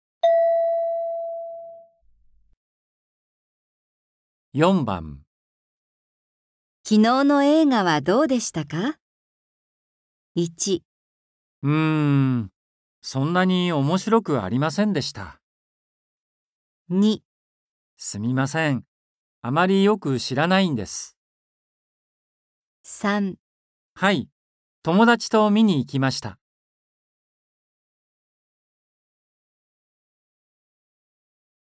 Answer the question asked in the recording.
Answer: 1

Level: N4.42